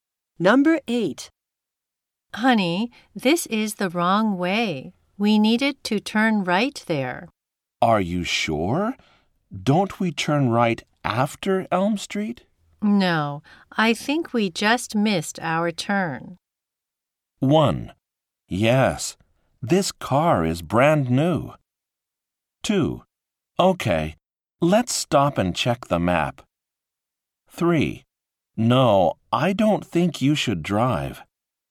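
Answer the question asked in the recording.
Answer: 2: Okay, let's stop and check the map.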